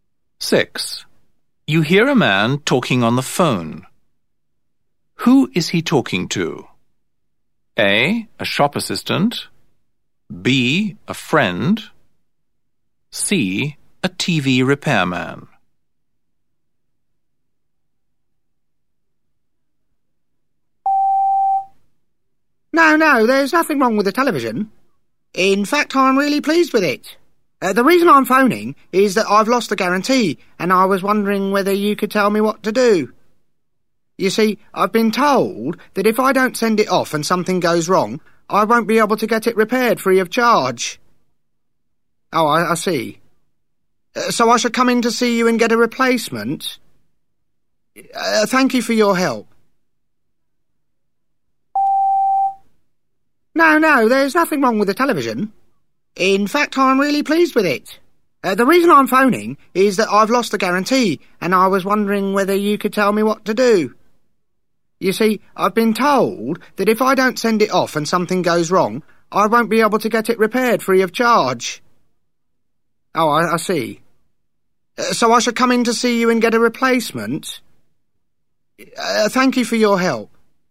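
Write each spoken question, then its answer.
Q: Who is he talking to?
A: A: A shop assistant.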